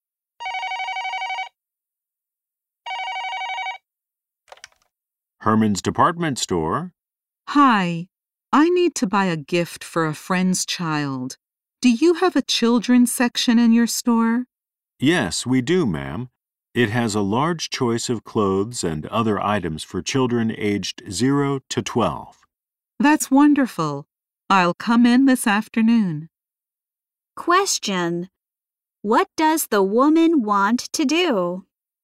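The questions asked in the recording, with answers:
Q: What does the woman want to do?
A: Buy a gift for a friend's child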